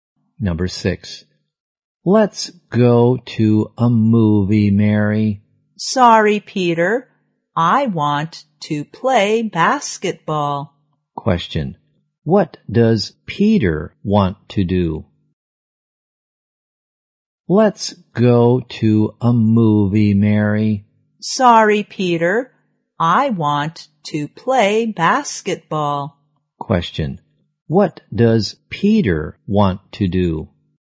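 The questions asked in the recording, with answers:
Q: What does Peter want to do?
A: Go to a movie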